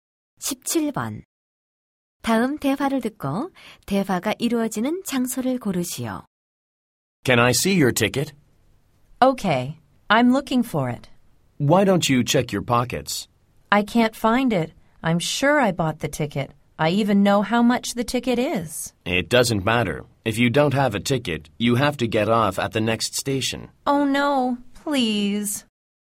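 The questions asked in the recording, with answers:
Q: 다음 대화를 듣고 대화가 이루어지는 장소를 고르시오.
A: 기차 안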